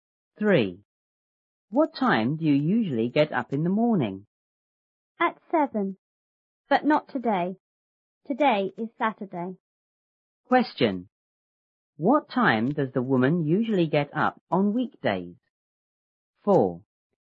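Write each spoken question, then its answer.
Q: What time does the woman usually get up on weekdays?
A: At 7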